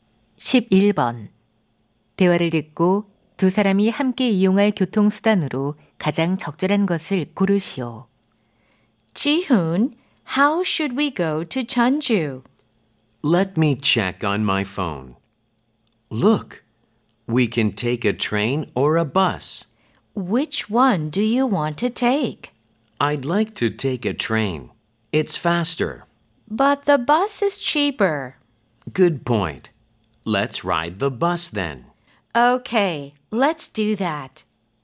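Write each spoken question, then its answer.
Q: 대화를 듣고 두 사람이 함께 이용할 교통수단으로 가장 적절한 것을 고르시오.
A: 버스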